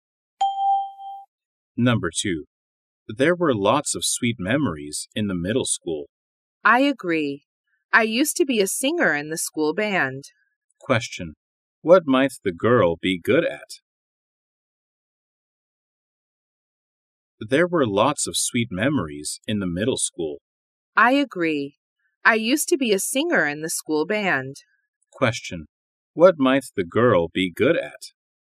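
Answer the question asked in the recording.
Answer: Singing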